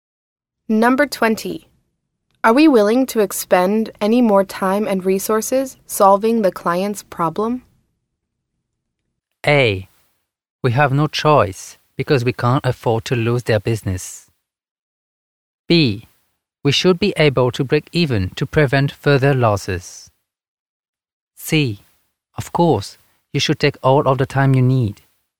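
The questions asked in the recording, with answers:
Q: Are we willing to expend any more time and resources solving the client's problem?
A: A: We have no choice because we can't afford to lose their business.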